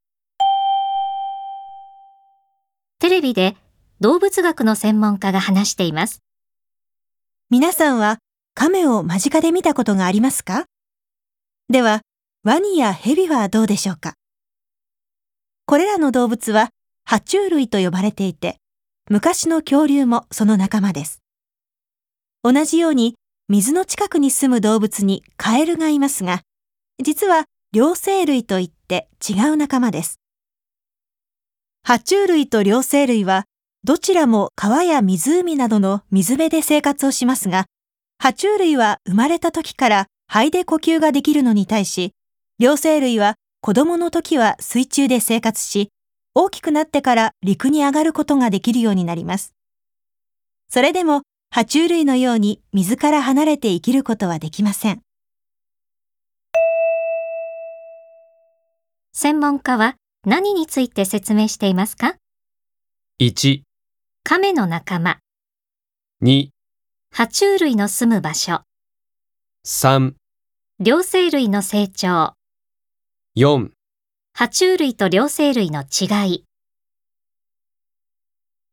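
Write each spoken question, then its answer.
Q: 専門家は何について説明していますか?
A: 4: 爬虫類と両生類の違い。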